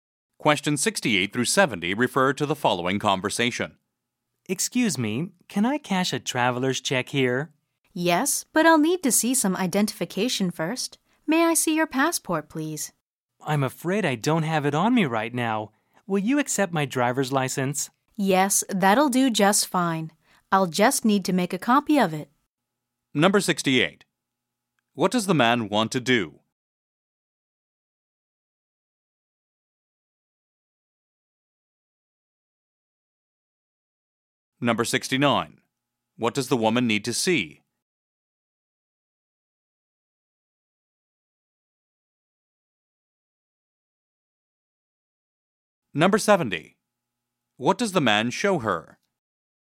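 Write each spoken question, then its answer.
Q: What does the man want to do?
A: Cash a traveler's check

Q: What does the woman need to see?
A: Identification (his passport)

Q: What does the man show her?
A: His driver's license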